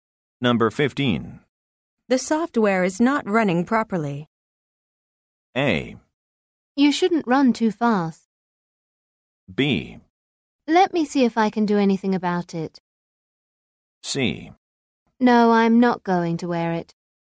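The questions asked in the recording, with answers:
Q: The software is not running properly.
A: B: Let me see if I can do anything about it.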